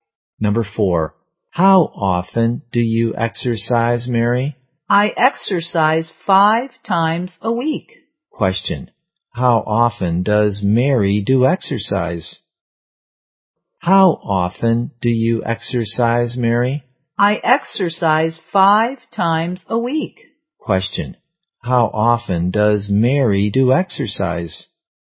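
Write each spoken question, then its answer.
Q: Question, how often does Mary do exercise?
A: Five times a week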